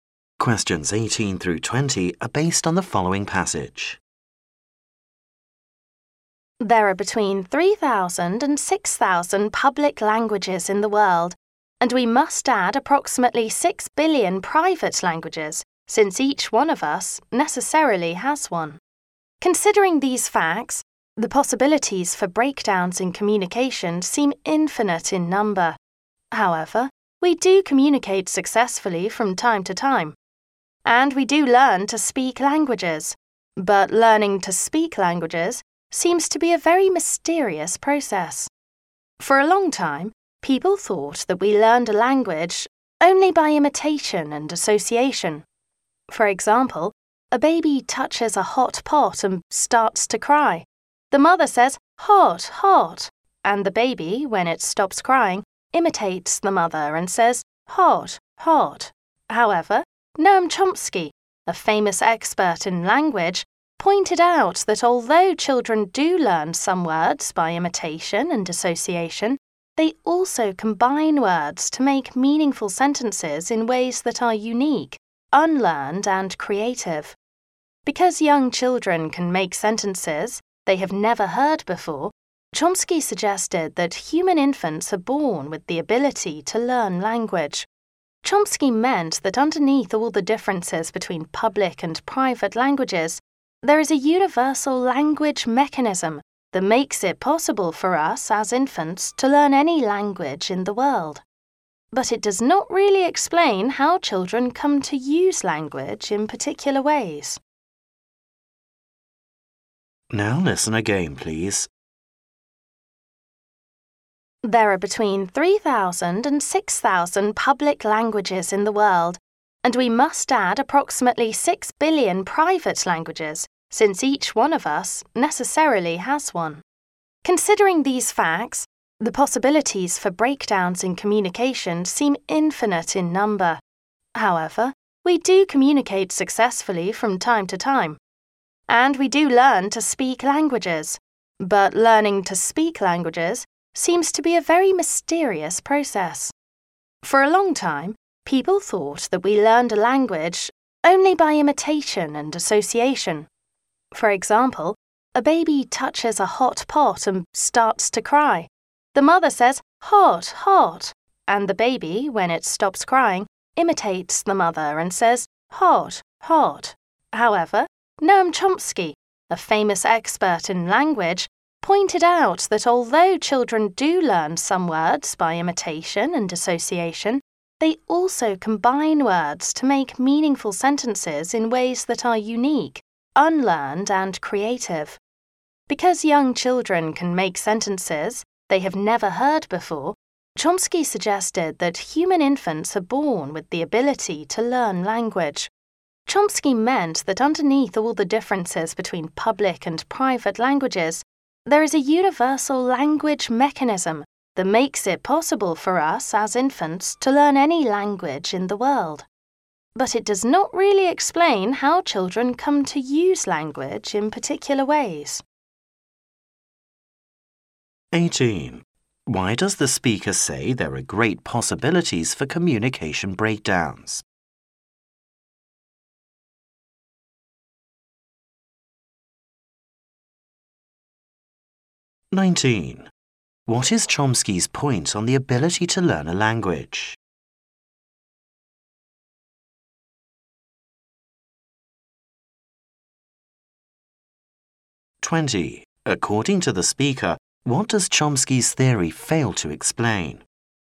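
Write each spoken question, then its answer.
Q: Why does the speaker say there are great possibilities for communication breakdowns?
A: There are so many public and private languages

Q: What is Chomsky's point on the ability to learn a language?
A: Human infants are born with the ability to learn language

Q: According to the speaker, what does Chomsky's theory fail to explain?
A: How children come to use language in particular ways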